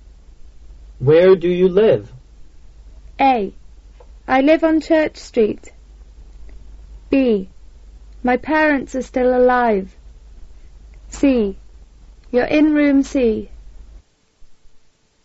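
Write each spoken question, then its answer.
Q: Where do you live?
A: A: I live on Church Street.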